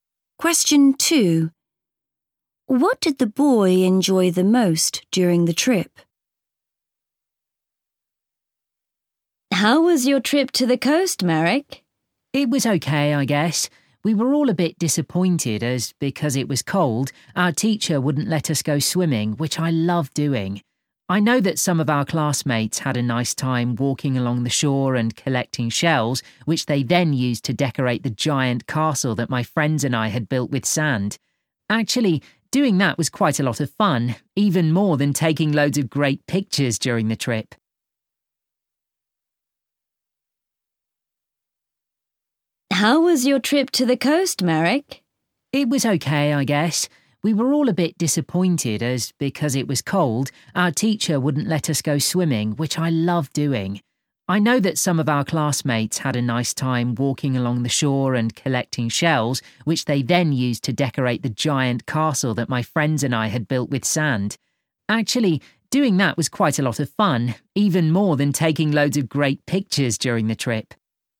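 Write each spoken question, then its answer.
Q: What did the boy enjoy the most during the trip?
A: Building a sand castle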